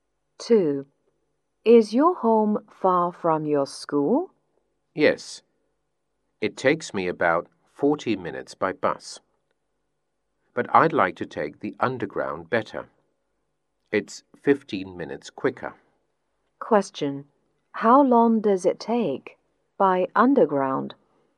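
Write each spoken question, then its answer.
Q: How long does it take by underground?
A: About 25 minutes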